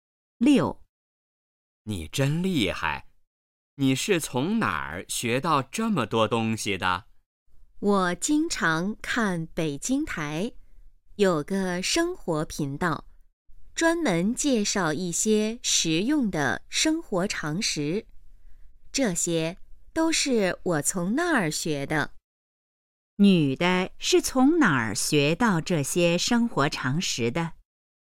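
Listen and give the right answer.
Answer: 北京台的生活频道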